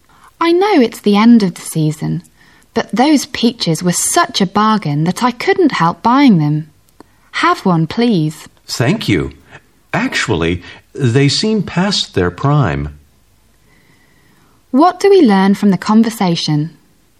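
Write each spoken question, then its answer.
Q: What do we learn from the conversation?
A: The peaches were cheap but no longer fresh.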